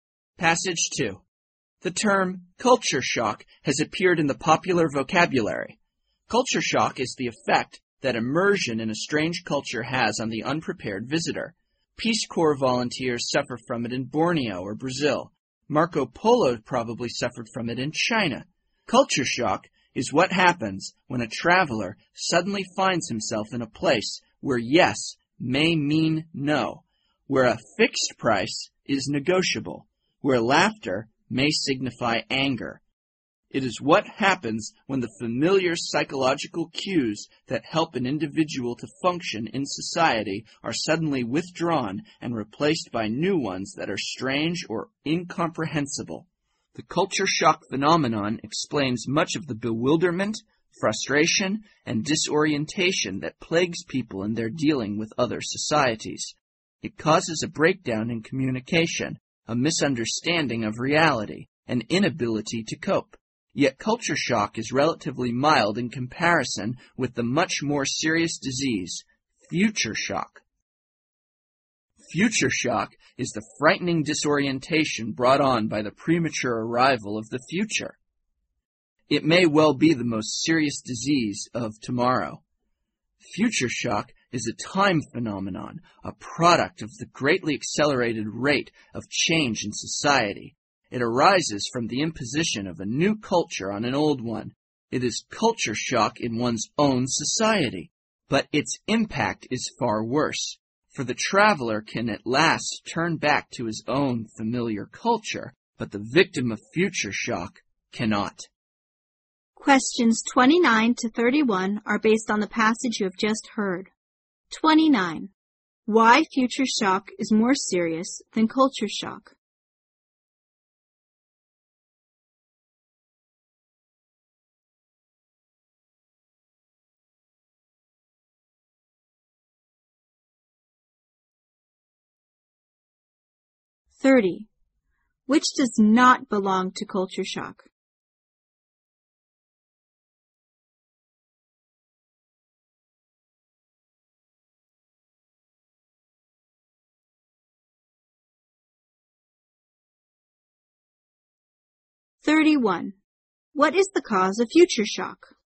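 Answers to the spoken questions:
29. Its victim cannot turn back to a familiar culture.
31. The greatly accelerated rate of change in society.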